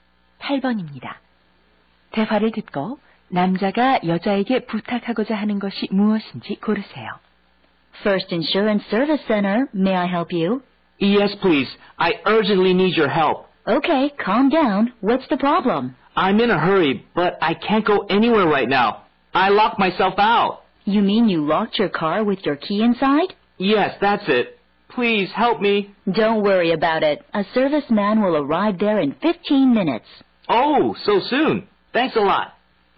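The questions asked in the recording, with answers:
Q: 대화를 듣고 남자가 여자에게 부탁하고자 하는 것이 무엇인지 고르세요.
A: 열쇠를 안에 두고 잠긴 차 문을 열어 달라는 것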